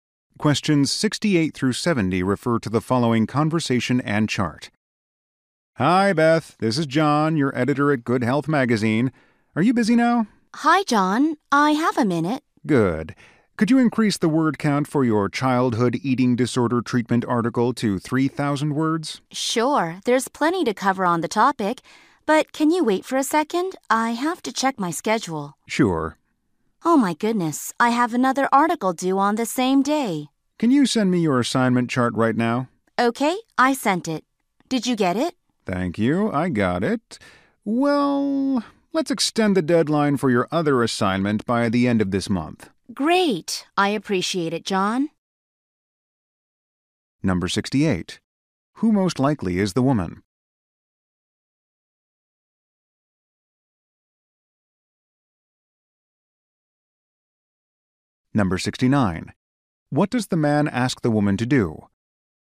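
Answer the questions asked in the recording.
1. A writer for a magazine
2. Increase the article's word count to 3,000 words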